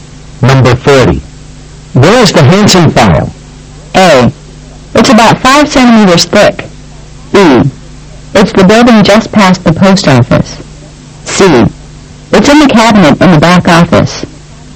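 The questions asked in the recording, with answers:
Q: Where is the Hansen file?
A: C: It's in the cabinet in the back office.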